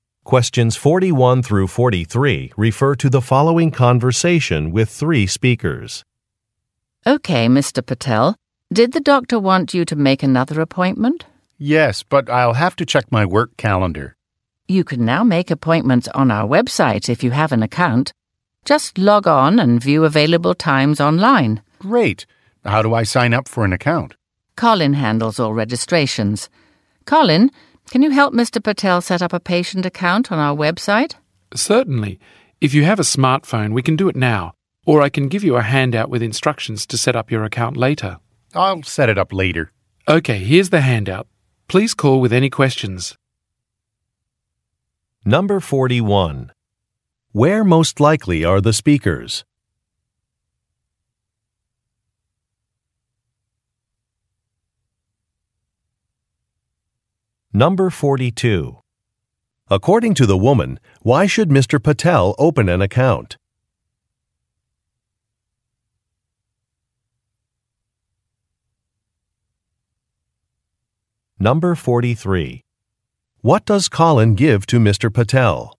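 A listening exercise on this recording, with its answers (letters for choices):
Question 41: Where most likely are the speakers?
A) At a medical office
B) At a bank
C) At an electronics store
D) At a library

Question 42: According to the woman, why should Mr. Patel open an account?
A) To view a presentation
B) To make an appointment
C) To receive a free gift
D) To leave some feedback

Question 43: What does Colin give to Mr. Patel?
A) An application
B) A receipt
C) A registration card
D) A set of instructions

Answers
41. A
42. B
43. D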